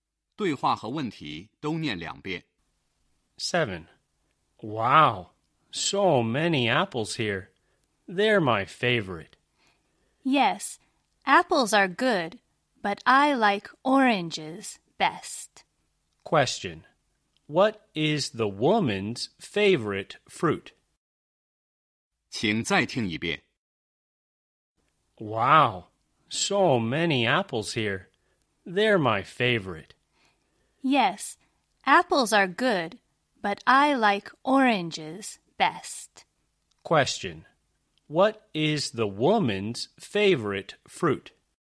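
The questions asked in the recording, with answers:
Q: What is the woman's favorite fruit?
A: Oranges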